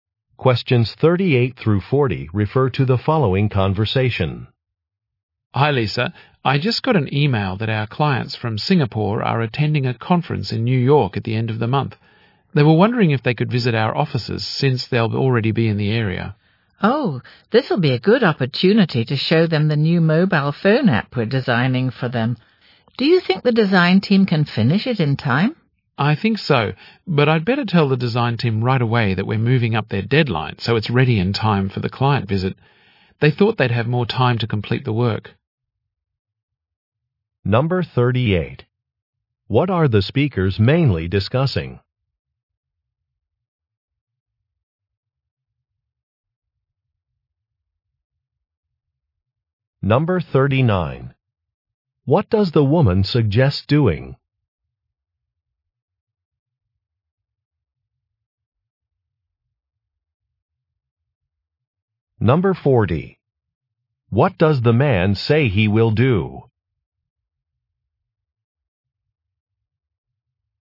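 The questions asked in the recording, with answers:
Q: What are the speakers mainly discussing?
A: A visit from clients from Singapore

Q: What does the woman suggest doing?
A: Showing the clients the new mobile phone app

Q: What does the man say he will do?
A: Tell the design team that the deadline is moved up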